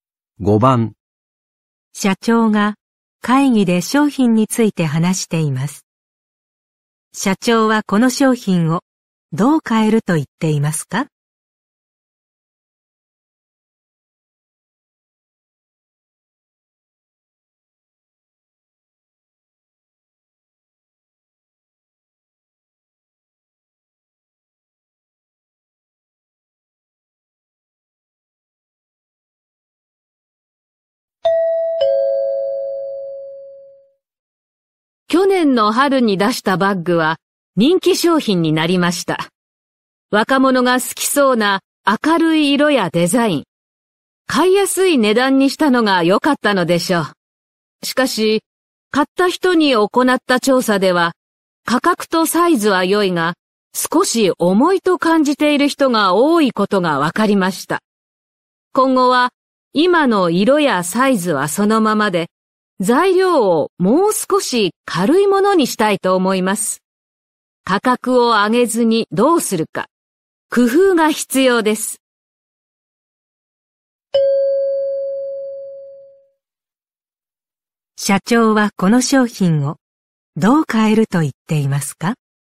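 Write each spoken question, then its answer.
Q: 社長はこの商品をどう変えると言っていますか?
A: 材料をもう少し軽いものにする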